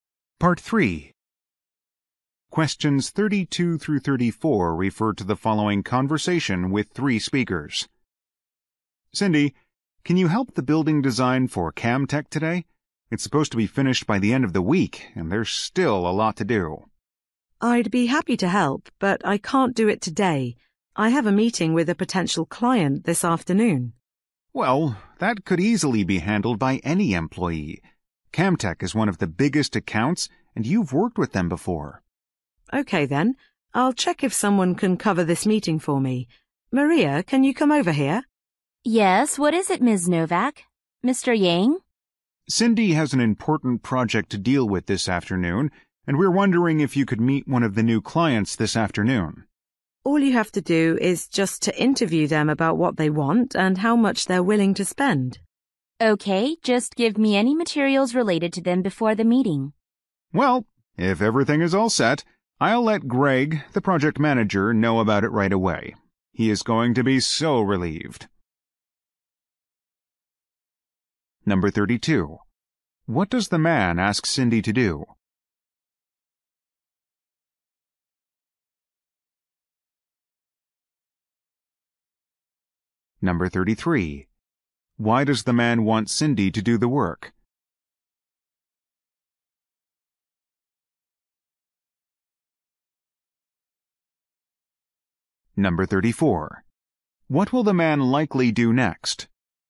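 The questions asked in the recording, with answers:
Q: What does the man ask Cindy to do?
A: Help with the building design for Camtech

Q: Why does the man want Cindy to do the work?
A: She has worked with Camtech before

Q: What will the man likely do next?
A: Tell Greg, the project manager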